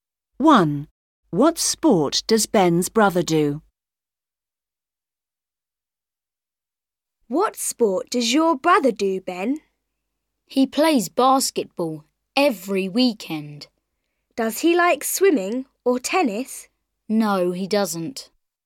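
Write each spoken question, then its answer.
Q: What sport does Ben's brother do?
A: basketball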